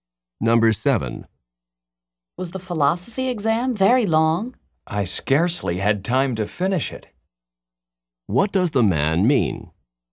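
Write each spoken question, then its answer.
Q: What does the man mean?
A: The exam was long; he almost didn't finish.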